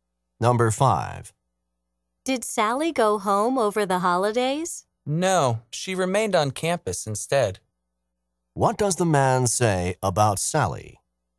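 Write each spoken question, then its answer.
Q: What does the man say about Sally?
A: She stayed on campus over the holidays.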